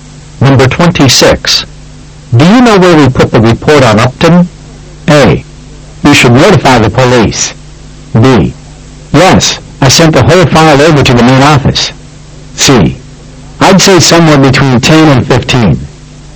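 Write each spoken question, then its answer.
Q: Do you know where we put the report on Upton?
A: B: Yes, I sent the whole file over to the main office.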